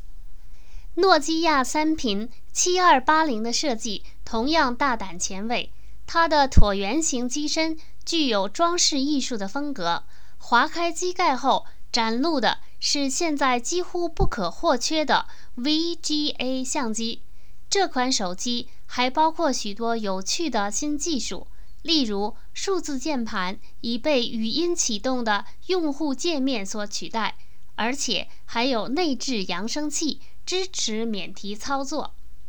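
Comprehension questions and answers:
Please answer the following questions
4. 诺基亚三频7280手机有什么特点?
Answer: 设计大胆前卫,椭圆形机身有装饰艺术风格,划开机盖有VGA相机,数字键盘被语音启动的用户界面取代,有内置扬声器支持免提操作。

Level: 3rd Year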